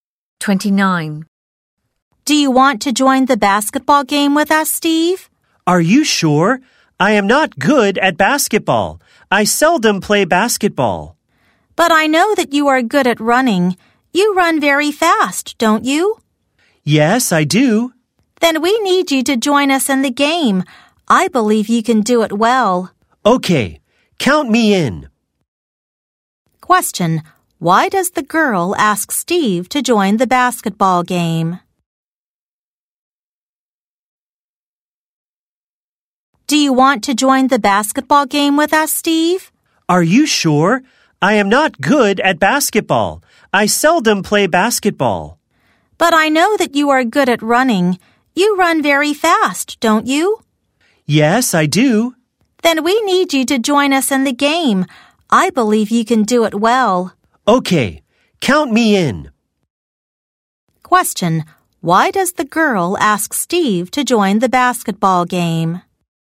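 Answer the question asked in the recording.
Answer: Because he runs very fast.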